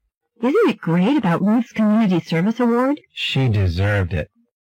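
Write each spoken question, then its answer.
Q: What does the man mean?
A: Ruth deserved the award.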